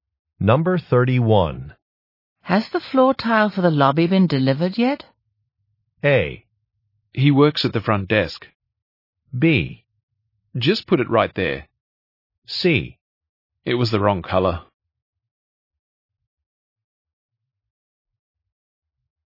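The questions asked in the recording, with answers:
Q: Has the floor tile for the lobby been delivered yet?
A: C: It was the wrong color.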